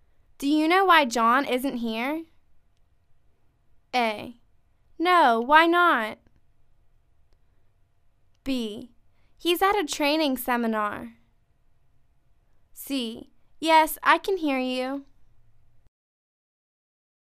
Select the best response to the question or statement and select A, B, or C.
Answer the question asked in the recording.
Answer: He's at a training seminar.